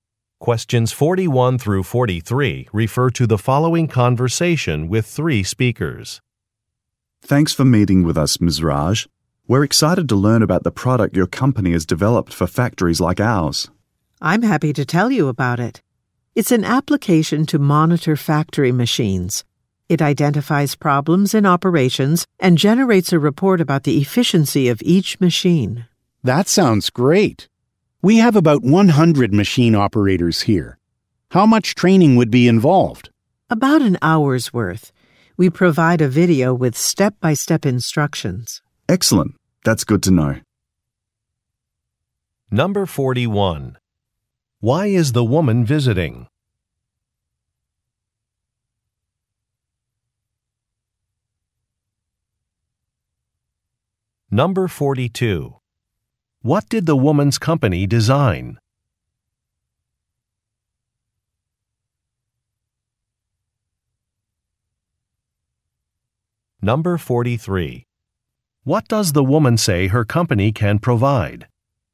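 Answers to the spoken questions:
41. To present her company's product
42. An application to monitor factory machines
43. A training video with step-by-step instructions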